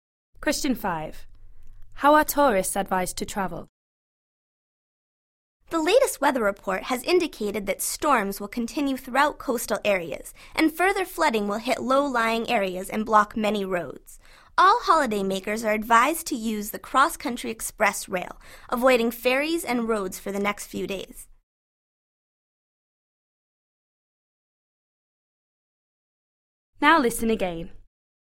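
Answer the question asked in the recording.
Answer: By train (the cross-country express rail)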